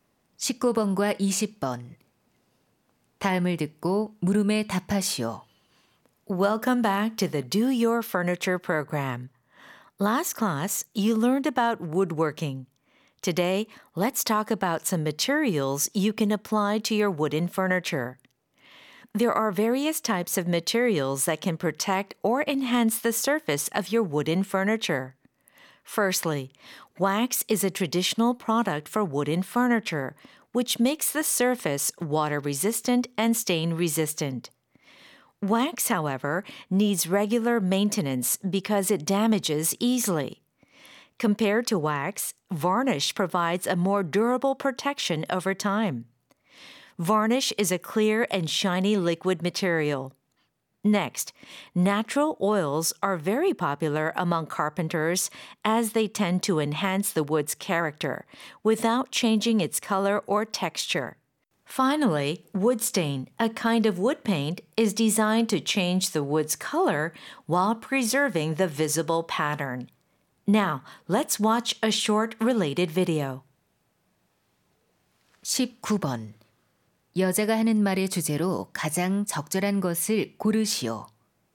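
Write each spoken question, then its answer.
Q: 여자가 하는 말의 주제로 가장 적절한 것을 고르시오.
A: 목재 가구 표면에 바를 수 있는 재료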